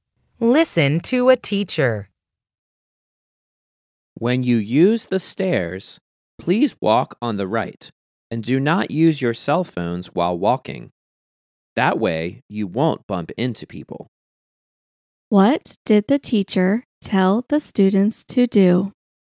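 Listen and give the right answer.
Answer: Walk on the right on the stairs and not use cell phones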